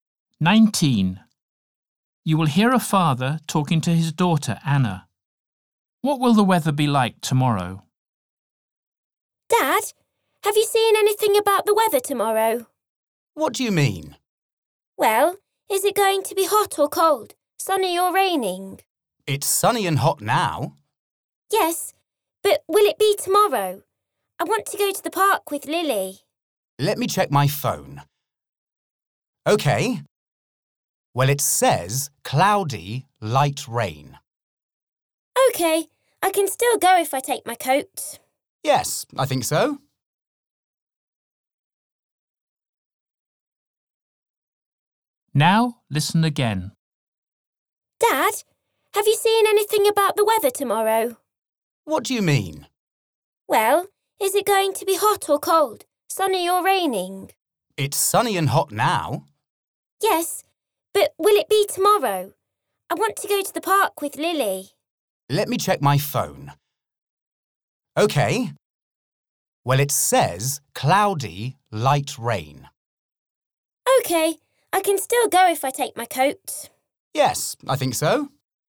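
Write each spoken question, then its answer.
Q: What will the weather be like tomorrow?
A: cloudy with light rain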